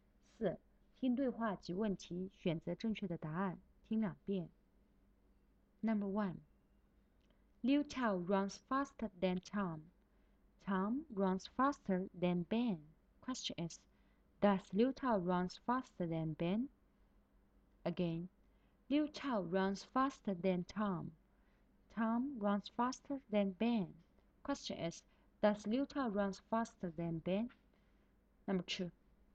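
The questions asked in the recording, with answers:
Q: Does Liu Tao run faster than Ben?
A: Yes, he does.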